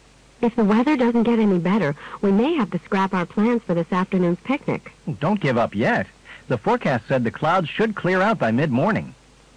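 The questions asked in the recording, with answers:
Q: What does the man imply?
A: They shouldn't cancel the picnic yet; the weather is expected to clear up.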